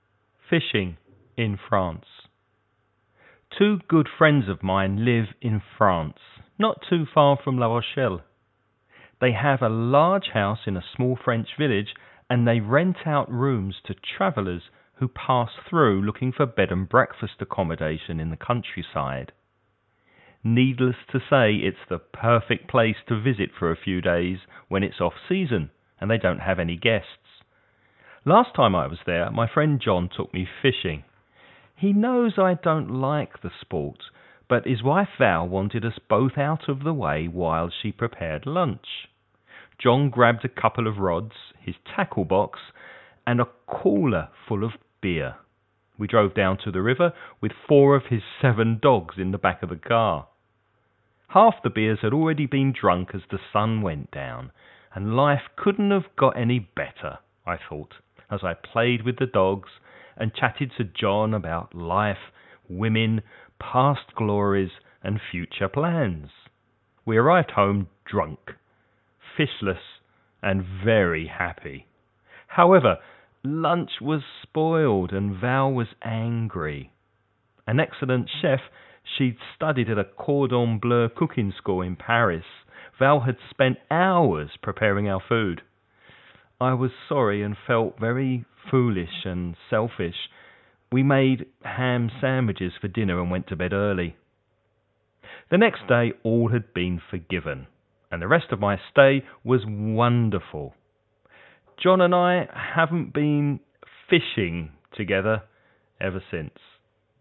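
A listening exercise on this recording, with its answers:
Listen and write the questions you hear.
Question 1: What kind of business do Val and John have?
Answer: They rent out rooms as bed and breakfast accommodation

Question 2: What does 'the sport' mean in paragraph two?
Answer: Fishing

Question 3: How many dogs went fishing with the two men?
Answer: Four

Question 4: Did the two men manage to catch any fish?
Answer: No

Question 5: What did they have for dinner?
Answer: Ham sandwiches

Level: nivel avanzado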